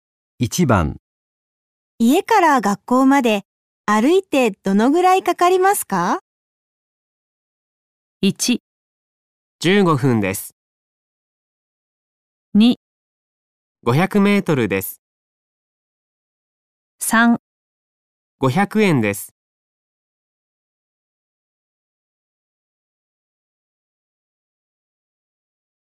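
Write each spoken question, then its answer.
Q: 家から学校まで歩いてどのぐらいかかりますか?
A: 1: 15分です。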